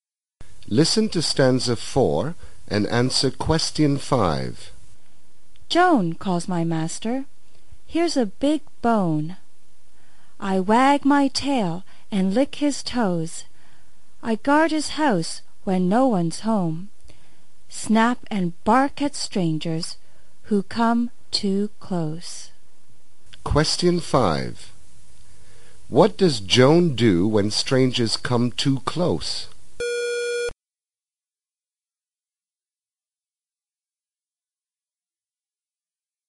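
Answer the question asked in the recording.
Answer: Snaps and barks at them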